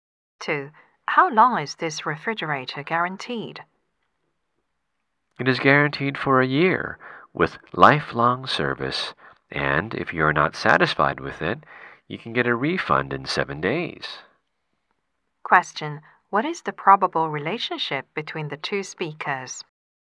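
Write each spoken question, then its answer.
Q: What is the probable relationship between the two speakers?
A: Salesperson and customer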